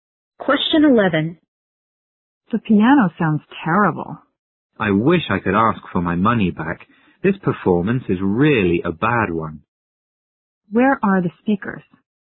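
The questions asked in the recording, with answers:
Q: Where are the speakers?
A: At a concert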